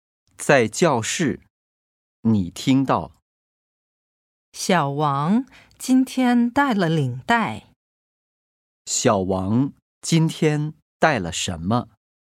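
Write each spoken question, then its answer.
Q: 小王今天带了什么?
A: 领带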